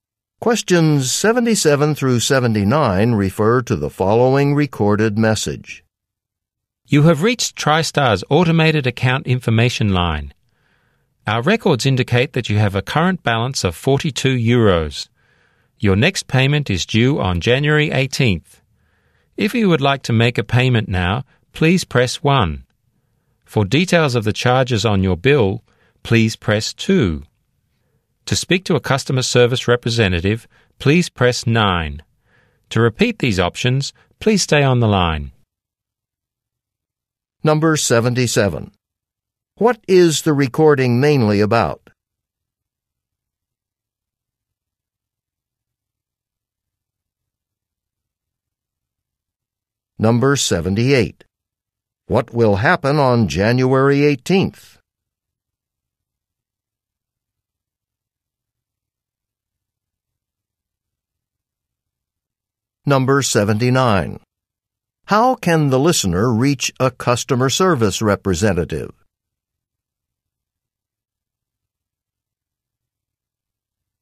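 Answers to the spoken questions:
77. Account information
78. A payment is due
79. By pressing 9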